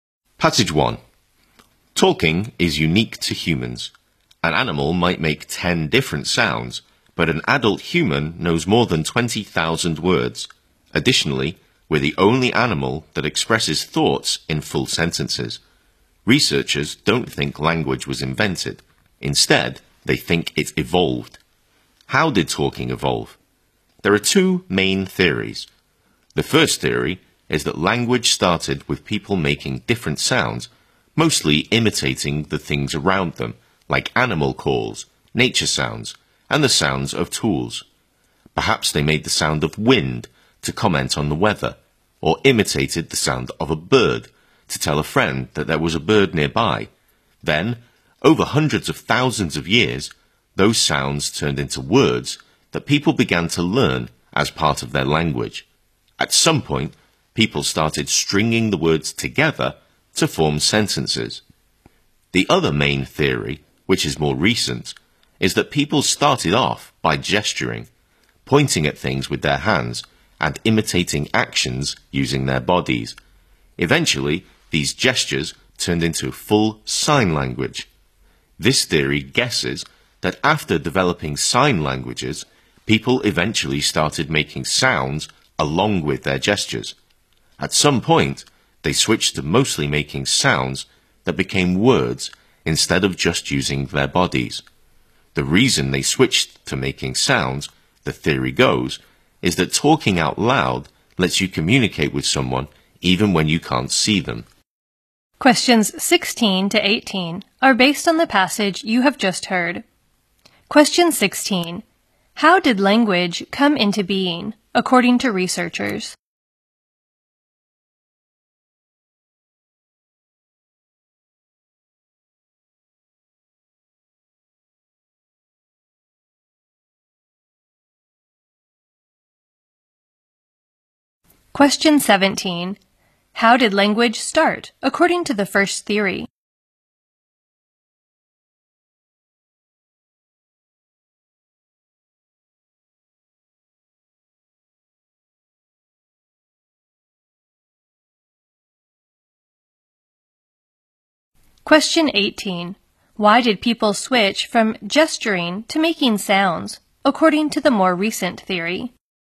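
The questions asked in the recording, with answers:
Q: How did language come into being, according to researchers?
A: It evolved; it was not invented.

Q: How did language start, according to the first theory?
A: People made sounds copying things around them.

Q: Why did people switch from gesturing to making sounds, according to the more recent theory?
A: Talking lets you communicate with someone even when you can't see them.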